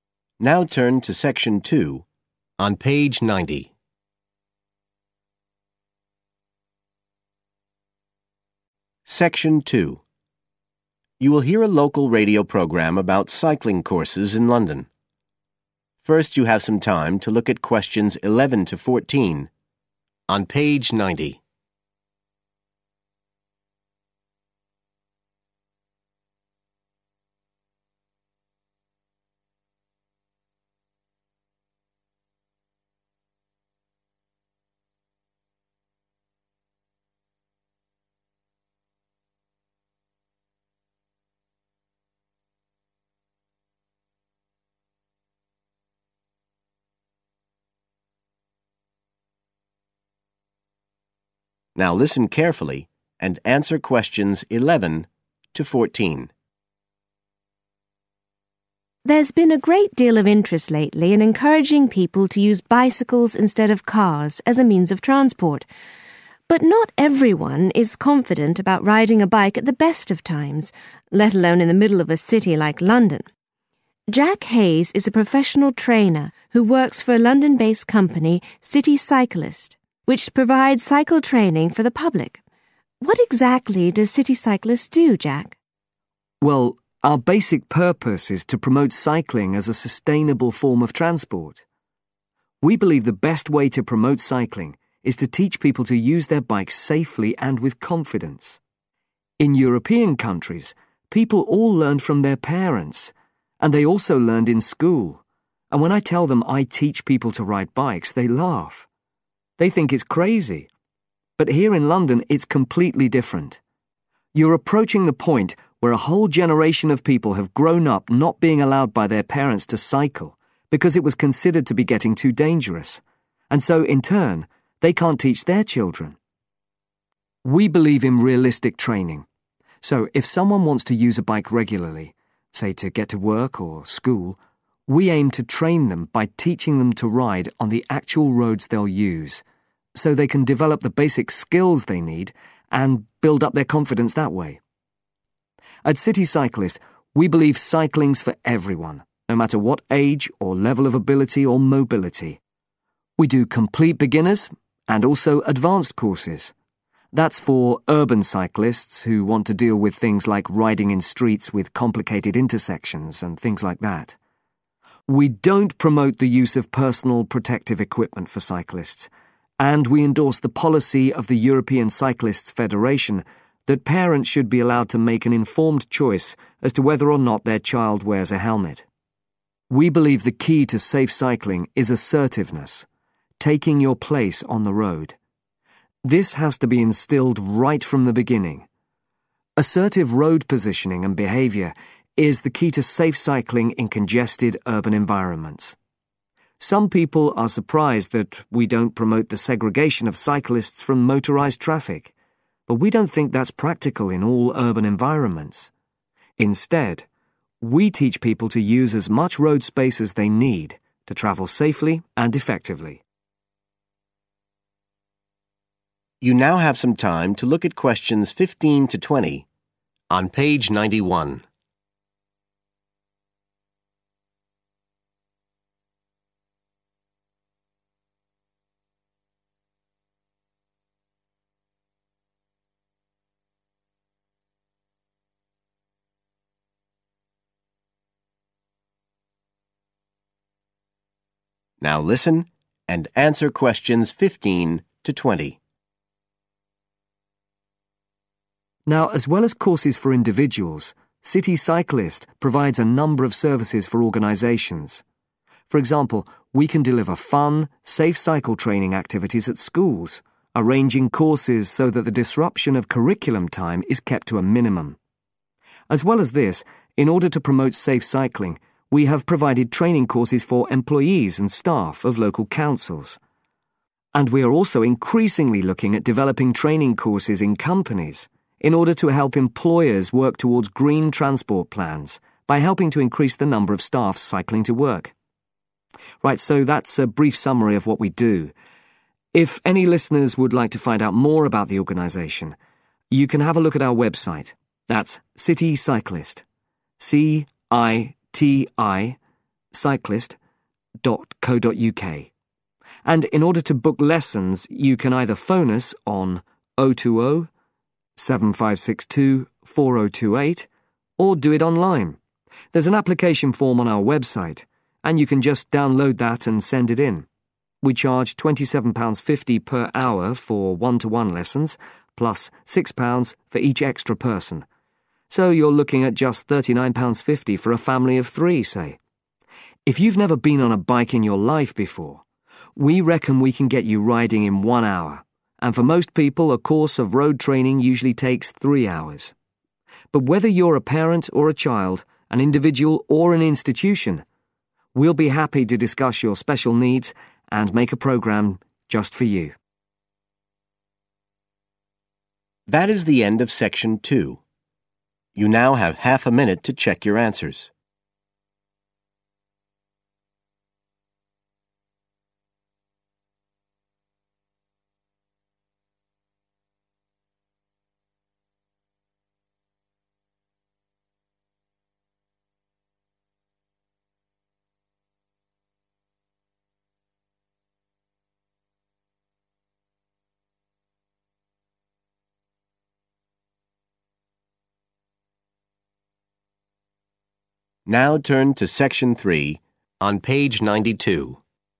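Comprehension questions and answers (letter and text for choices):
Choose the correct letter, A, B or C.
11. Jack says that in London these days, many people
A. see cycling as a foolish activity.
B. have no experience of cycling.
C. take too many risks when cycling.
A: B. have no experience of cycling.

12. If people want to cycle to school or work. CitiCyclist helps them by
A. giving cycling lessons on the route they take.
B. advising them on the safest route to choose.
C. teaching them basic skills on quiet roads first.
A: A. giving cycling lessons on the route they take.

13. Jack works with some advanced cyclists who want to develop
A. international competitive riding skills.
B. knowledge of advanced equipment.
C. confidence in complex road systems.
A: C. confidence in complex road systems.

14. CitiCyclist supports the view that cyclists should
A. have separate sections of the road from motor traffic.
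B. always wear protective clothing when cycling.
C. know how to ride confidently on busy roads.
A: C. know how to ride confidently on busy roads.

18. phone: 18.............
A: 020 7562 4028

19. cost (single person): 19............... per lesson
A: £27.50

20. usual length of course: 20.............. (except complete beginners)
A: 3 hours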